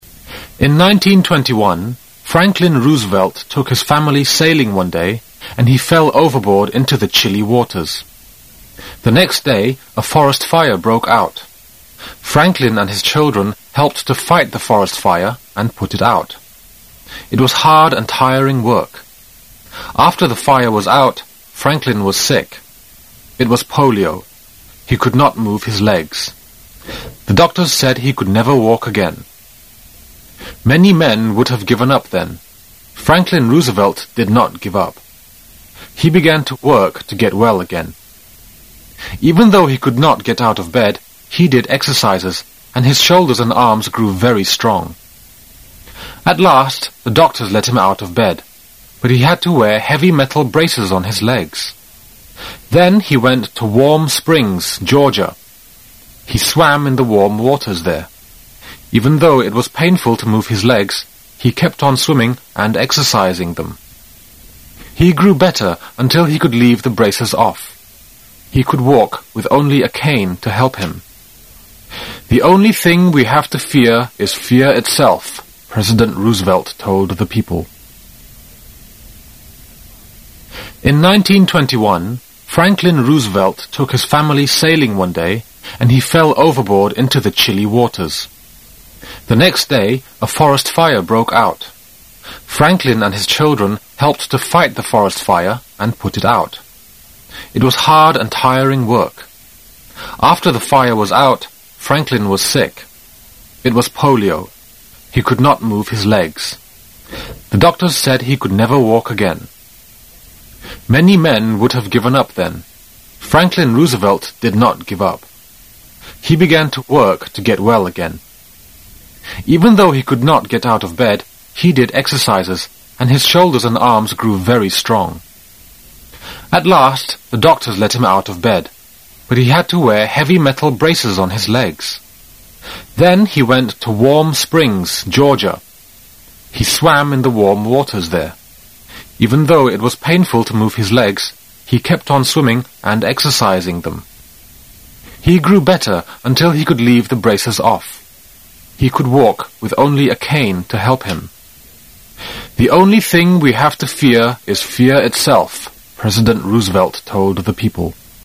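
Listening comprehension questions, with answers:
You will hear a passage about women's rights. Listen and complete the sentences in questions 1~5 with the information you have heard. Write not more than 3 words in each box. You, will hear the recording twice. You now have 25 seconds to read the sentences in question.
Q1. Franklin Roosevelt fell into the river when he and his family __________.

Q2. Franklin caught_______.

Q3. When he was sick in bed, he did exercises to make __________.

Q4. He kept __________.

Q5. Franklin Roosevelt told the Americans that the only thing we have to fear is ________.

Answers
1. went sailing
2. polio
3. shoulders and arms strong
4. swimming and exercising
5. fear itself

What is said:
[解析] 1-5 In 1921, Franklin Roosevelt took his family sailing one day and he fell overboard into the chilly waters. The next day, a forest fire broke out. Franklin and his children helped to fight the forest fire and put it out. 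It was hard and tiring work. After the fire was out, Franklin was sick. It was polio. He could not move his legs. The doctors said he could never walk again. Many men would have given up then. Franklin Roosevelt did not give up. He began to work to get well again. Even though he could not get out of bed, he did exercises, and his shoulders and arms grew very strong. At last the doctors let him out of bed, but he had to wear heavy metal braces on his legs. Then he went to Warm Springs, Georgia. He swam in the warm waters there. Even though it was painful to move his legs, he kept on swimming and exercising them. He grew better until he could leave the braces off. He could walk with only a cane to help him. "The only thing we have to fear is fear itself, "President Roosevelt told the people.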